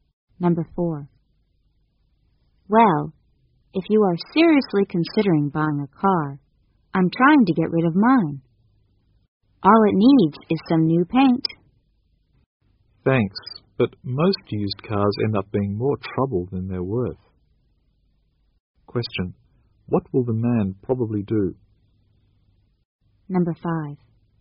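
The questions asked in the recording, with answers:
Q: What will the man probably do?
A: Not buy the woman's used car.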